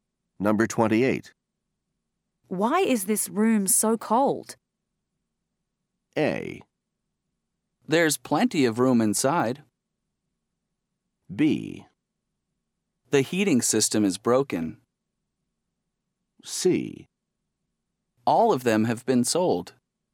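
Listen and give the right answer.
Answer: B: The heating system is broken.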